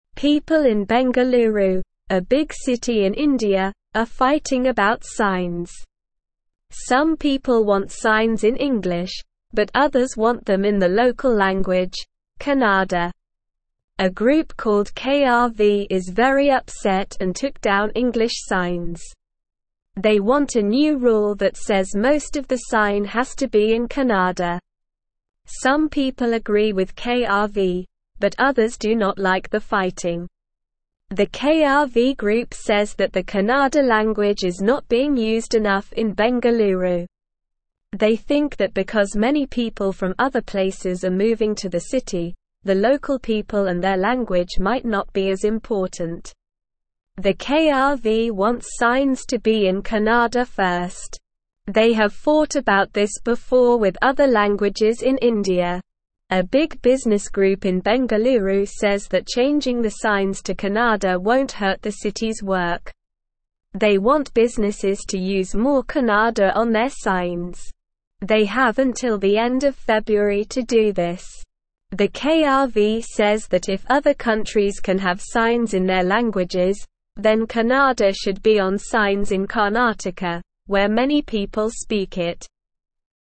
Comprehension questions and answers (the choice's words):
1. What are people in Bengaluru fighting about?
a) Food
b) Signs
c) Sports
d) Music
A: Signs

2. What language do some people want the signs to be in?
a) Kannada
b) English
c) Hindi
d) Tamil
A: Kannada

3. What group took down the English signs?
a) Business group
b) Local people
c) KRV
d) Government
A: KRV

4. Why does the KRV group want signs to be in Kannada first?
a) They think the language is not being used enough in Bengaluru.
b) They want to make it difficult for people from other places to understand.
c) They want to show their power and control over the city.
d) They want to make the city more international.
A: They think the language is not being used enough in Bengaluru.

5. What does the business group in Bengaluru want businesses to do?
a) Use only English on their signs.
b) Use more Kannada on their signs.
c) Use signs in multiple languages.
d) Use signs in the local language of each business.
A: Use more Kannada on their signs.

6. When do businesses have to change their signs to include more Kannada?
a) By the end of March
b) By the end of April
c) By the end of May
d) By the end of February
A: By the end of February

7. Where does the KRV group think Kannada should be on signs?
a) Bengaluru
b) India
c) Other countries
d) Karnataka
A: Karnataka

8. What is the main reason the KRV group wants signs to be in Kannada?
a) They want to make the city more diverse.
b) They want to make it difficult for tourists to understand.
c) They want to preserve the importance of the local language.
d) They want to show their dominance over other languages.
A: They want to preserve the importance of the local language.

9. KRV wants a new rule that says most of the sign should be in Kannada.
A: True

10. People in Bengaluru are agreeing about whether signs should be in English and Kannada.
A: False

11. A group called KRV is upset and has taken down English signs.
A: True

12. KRV believes that the Kannada language is not being used enough in Bengaluru.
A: True

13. Some people agree with KRV, but others like the fighting.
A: False

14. The KRV says that if other countries cannot have signs in their languages, then Kannada should not be on signs in Karnataka.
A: False

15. The KRV group has fought about language issues before in India.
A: True

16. A small business group in Bengaluru supports not using more Kannada on signs.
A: False

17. Some people want signs in (1)______, but others want them in the (2)______ language, Kannada.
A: English

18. Some people want signs in (1)______, but others want them in the (2)______ language, Kannada.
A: local

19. They want a new rule that (3)______ most of the sign has to be in Kannada.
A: says

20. Some people agree with KRV, but others do not like the (4)______.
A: fighting

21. The KRV group says that the Kannada (5)______ is not being (6)______ enough in Bengaluru.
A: language

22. The KRV group says that the Kannada (5)______ is not being (6)______ enough in Bengaluru.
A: used

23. The KRV wants (7)______ to be in (8)______ first.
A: signs

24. The KRV wants (7)______ to be in (8)______ first.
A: Kannada

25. A big (9)______ group in Bengaluru says that changing the signs to Kannada won't hurt the city's work.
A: business

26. They want (10)______ to use more Kannada on their signs.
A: businesses

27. The KRV says that if other countries can have signs in their (11)______, then Kannada should be on signs in Karnataka, where many people (12)______ it.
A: languages

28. The KRV says that if other countries can have signs in their (11)______, then Kannada should be on signs in Karnataka, where many people (12)______ it.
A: speak

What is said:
People in Bengaluru, a big city in India, are fighting about signs. Some people want signs in English, but others want them in the local language, Kannada. A group called KRV is very upset and took down English signs. They want a new rule that says most of the sign has to be in Kannada. Some people agree with KRV, but others do not like the fighting.
The KRV group says that the Kannada language is not being used enough in Bengaluru. They think that because many people from other places are moving to the city, the local people and their language might not be as important. The KRV wants signs to be in Kannada first. They have fought about this before with other languages in India.
A big business group in Bengaluru says that changing the signs to Kannada won't hurt the city's work. They want businesses to use more Kannada on their signs. They have until the end of February to do this. The KRV says that if other countries can have signs in their languages, then Kannada should be on signs in Karnataka, where many people speak it.

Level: Level 2